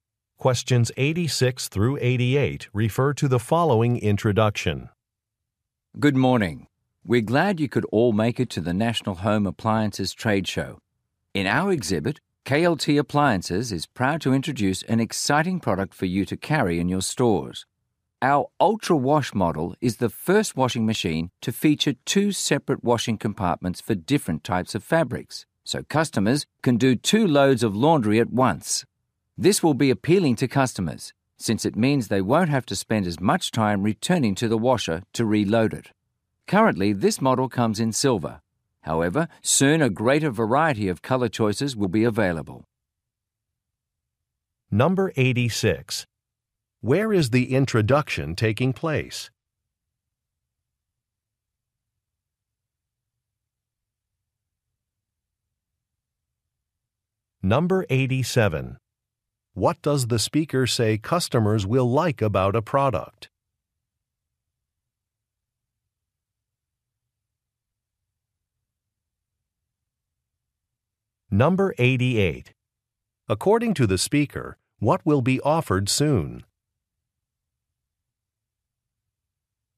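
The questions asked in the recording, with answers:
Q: Where is the introduction taking place?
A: At a home appliances trade show

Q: What does the speaker say customers will like about a product?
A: It saves time by washing two loads at once

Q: According to the speaker, what will be offered soon?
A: More color choices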